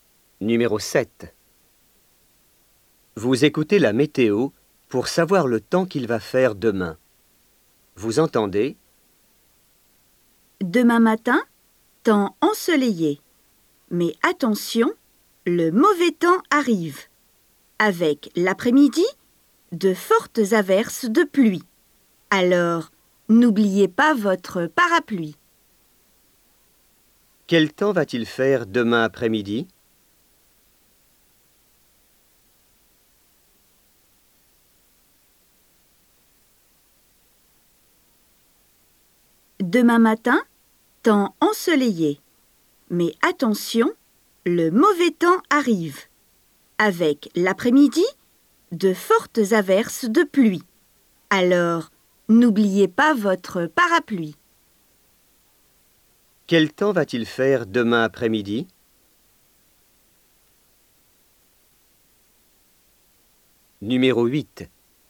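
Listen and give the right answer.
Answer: De fortes averses de pluie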